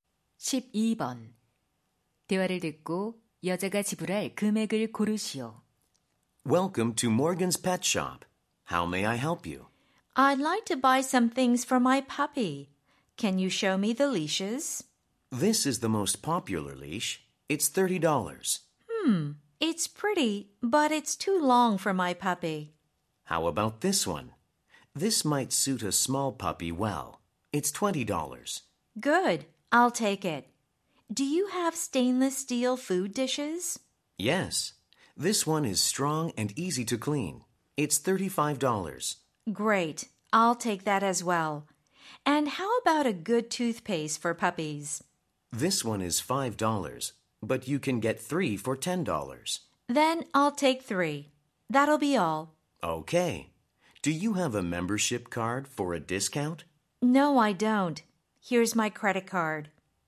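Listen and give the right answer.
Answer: $65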